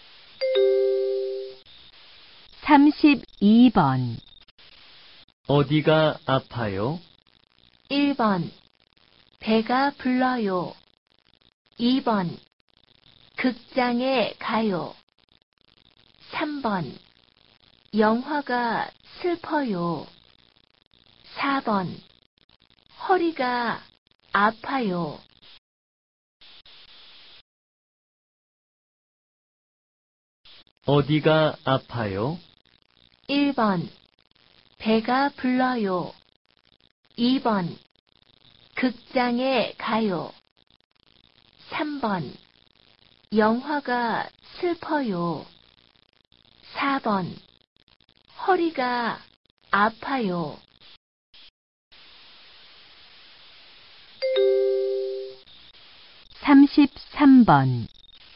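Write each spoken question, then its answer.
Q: 어디가 아파요?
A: 4: 허리가 아파요.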